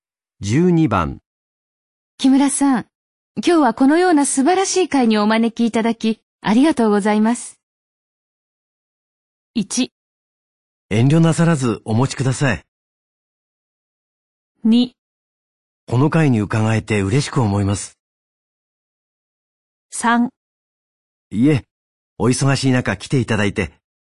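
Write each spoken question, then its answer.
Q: 木村さん、今日はこのような素晴らしい会にお招きいただきありがとうございます。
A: 3: いえ、お忙しい中来ていただいて。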